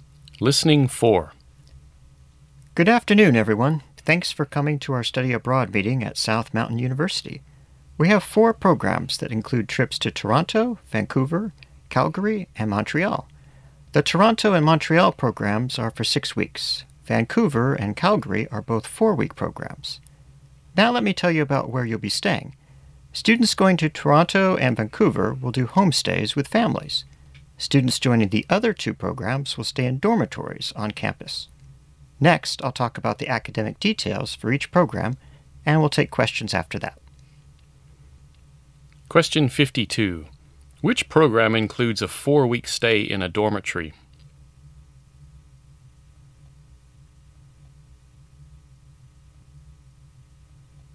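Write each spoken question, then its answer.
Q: Which program includes a 4-week stay in a dormitory?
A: The Calgary program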